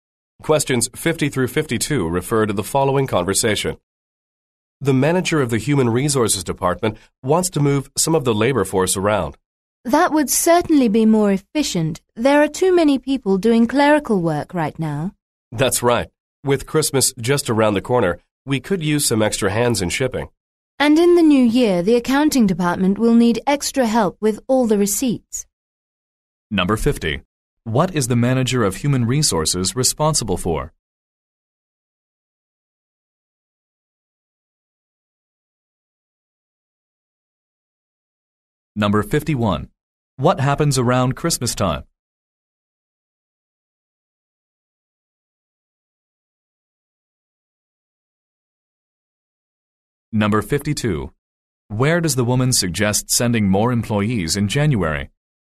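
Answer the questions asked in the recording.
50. Moving staff around (the labor force)
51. Shipping needs extra help
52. The accounting department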